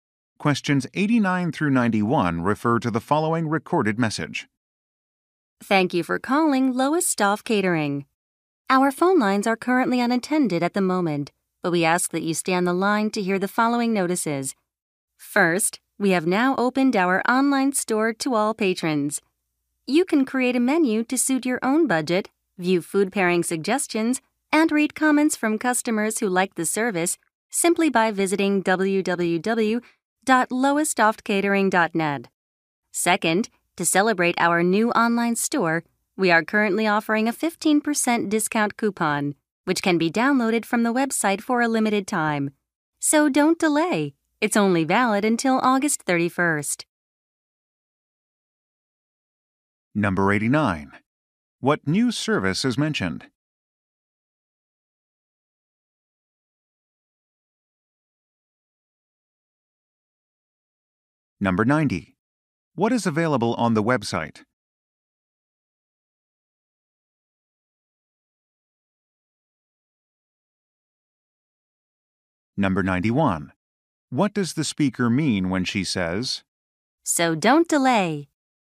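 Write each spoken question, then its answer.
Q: What new service is mentioned?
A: An online store

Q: What does the speaker mean when she says, "So don't delay"?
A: The discount is only available for a limited time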